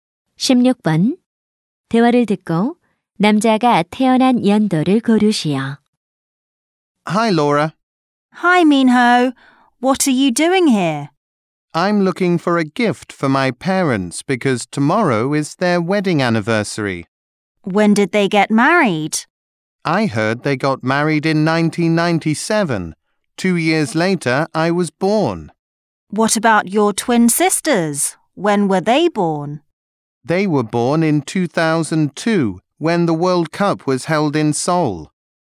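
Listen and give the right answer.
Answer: 1999년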